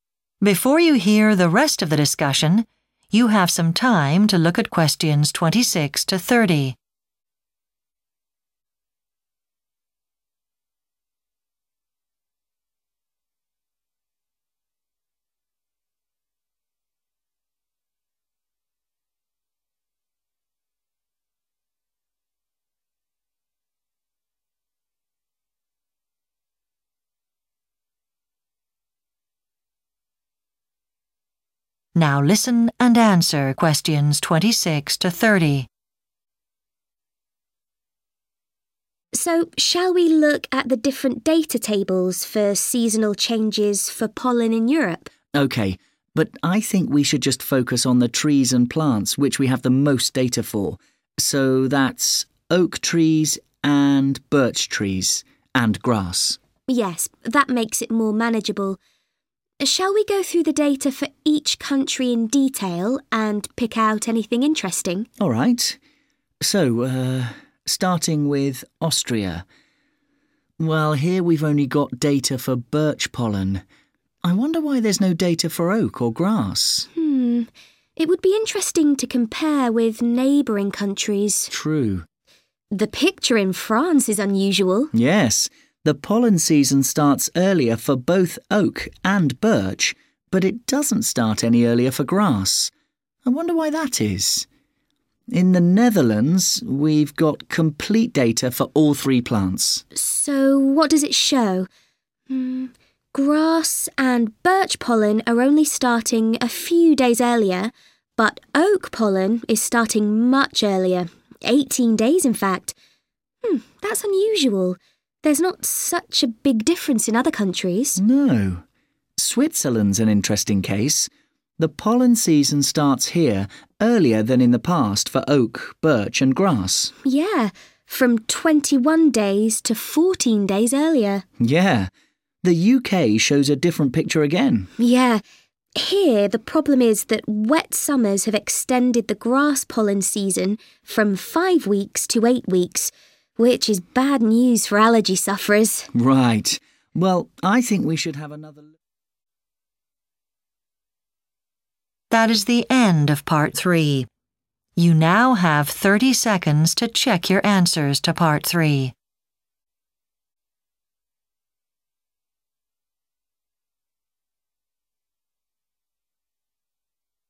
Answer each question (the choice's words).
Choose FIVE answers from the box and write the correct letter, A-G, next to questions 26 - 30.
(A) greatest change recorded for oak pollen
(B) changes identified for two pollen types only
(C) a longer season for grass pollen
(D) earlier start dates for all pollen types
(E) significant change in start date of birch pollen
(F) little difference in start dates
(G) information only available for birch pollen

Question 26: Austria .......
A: information only available for birch pollen

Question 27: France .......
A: changes identified for two pollen types only

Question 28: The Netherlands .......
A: greatest change recorded for oak pollen

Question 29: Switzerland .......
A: earlier start dates for all pollen types

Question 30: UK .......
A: a longer season for grass pollen